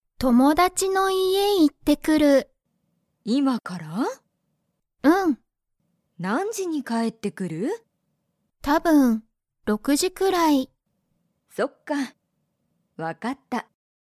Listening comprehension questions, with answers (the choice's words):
アミは、____に行いく。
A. アミの学校がっこう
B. アミの家いえ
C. 友達ともだちの学校がっこう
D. 友達ともだちの家いえ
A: 友達ともだちの家いえ

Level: Level 1